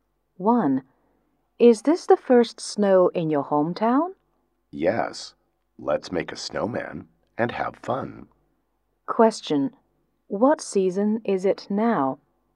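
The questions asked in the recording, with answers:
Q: What season is it now?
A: Winter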